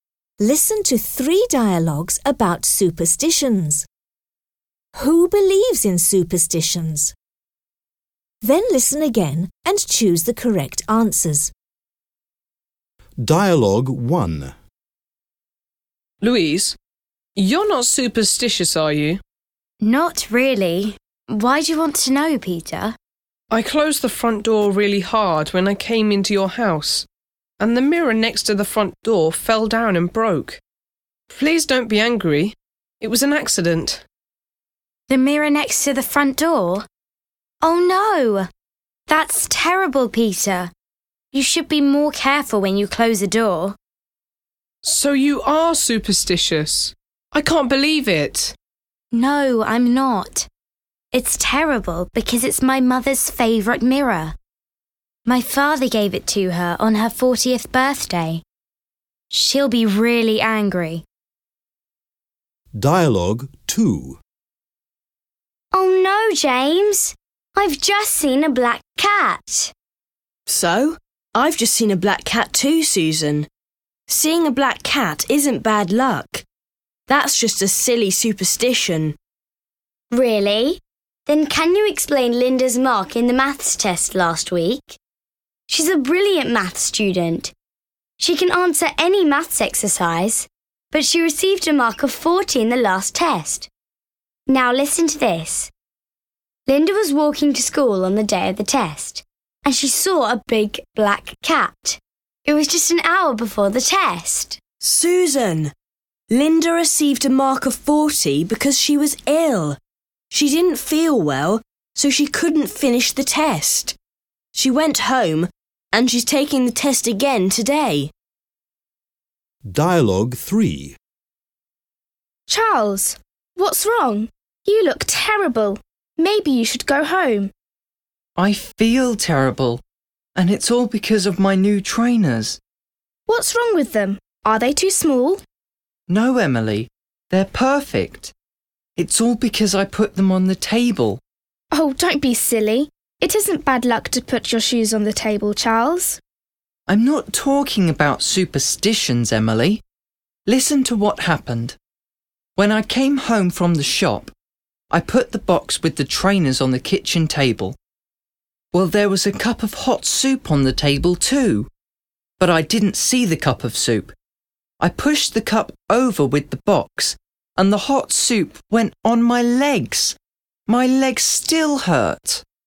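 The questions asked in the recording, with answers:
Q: Who believes in superstitions?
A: Susan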